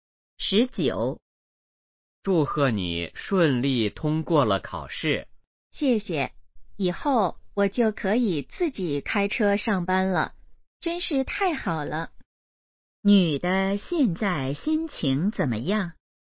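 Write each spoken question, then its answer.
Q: 女的现在心情怎么样?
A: 很高兴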